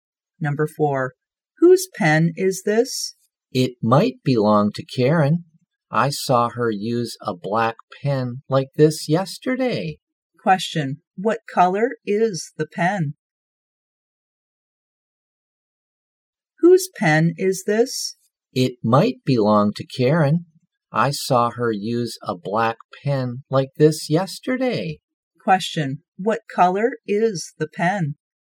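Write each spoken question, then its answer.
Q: what color is the pen?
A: Black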